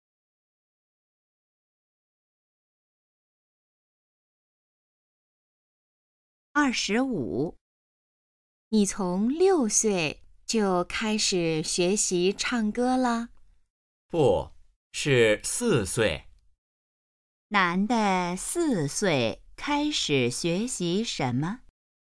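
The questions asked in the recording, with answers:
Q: 男的四岁开始学习什么?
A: 唱歌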